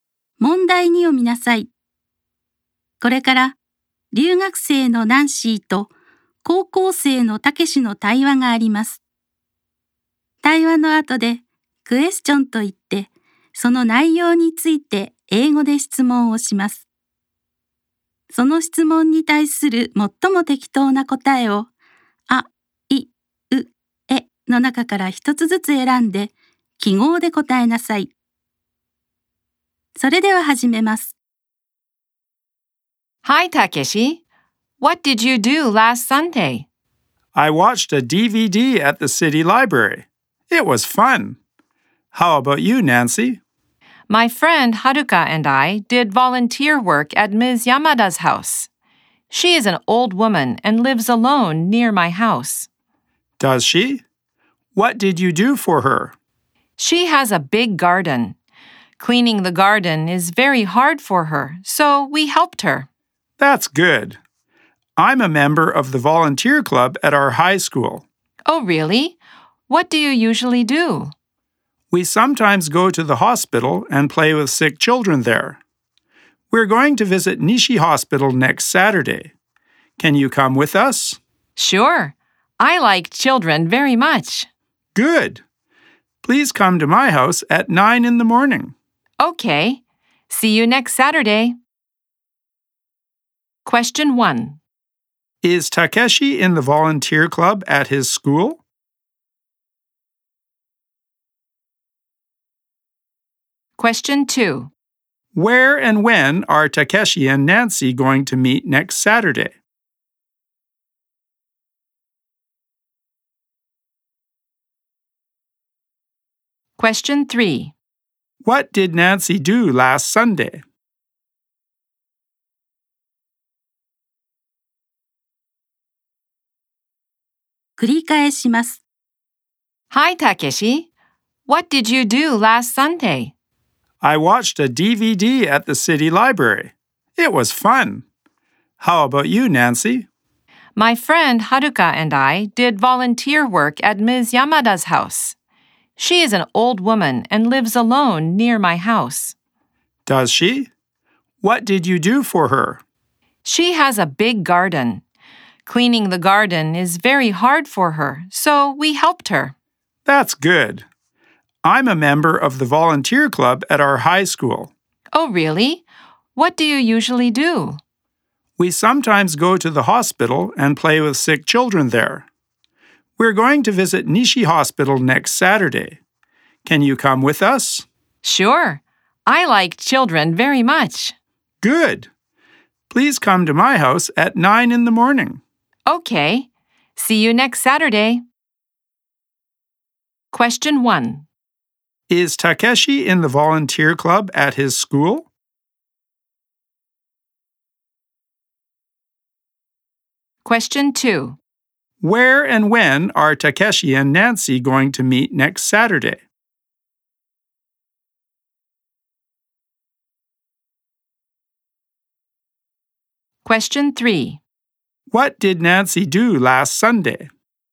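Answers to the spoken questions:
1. Yes, he is.
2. At Takeshi's house at 9 in the morning.
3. She did volunteer work: she helped clean Ms. Yamada's garden.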